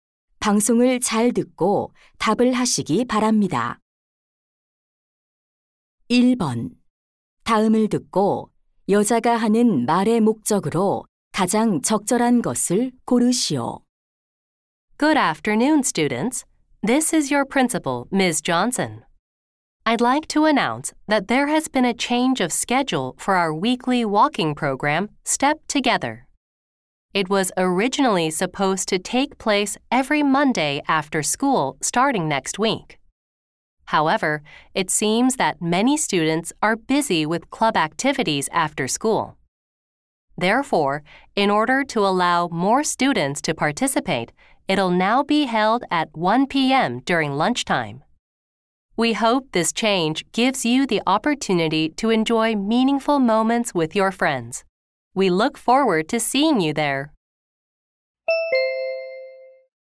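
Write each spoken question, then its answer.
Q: 다음을 듣고 여자가 하는 말의 목적으로 가장 적절한 것을 고르시오.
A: 걷기 프로그램 일정(시간) 변경을 안내하려고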